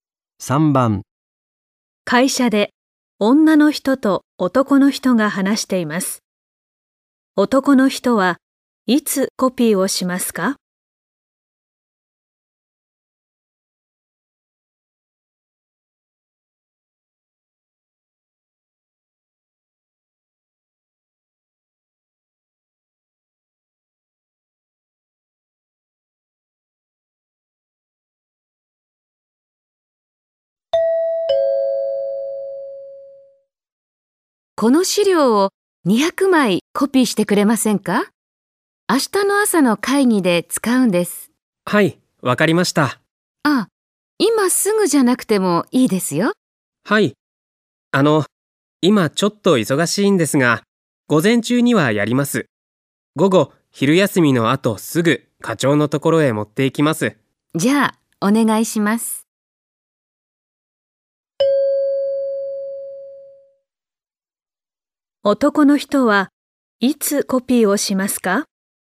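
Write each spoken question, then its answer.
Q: 男の人はいつコピーをしますか?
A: 午前中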